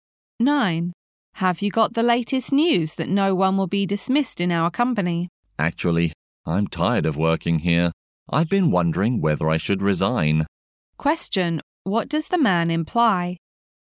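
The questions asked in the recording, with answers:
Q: What does the man imply?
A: He is thinking of quitting his job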